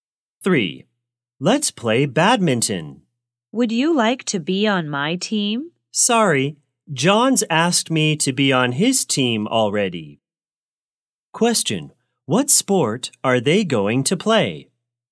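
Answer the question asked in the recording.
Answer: Badminton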